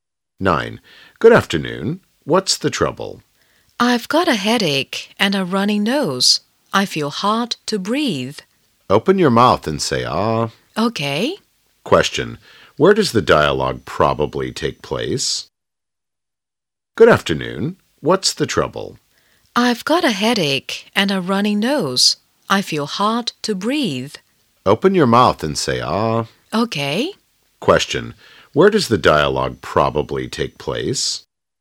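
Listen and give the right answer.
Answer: In a hospital (at a doctor's).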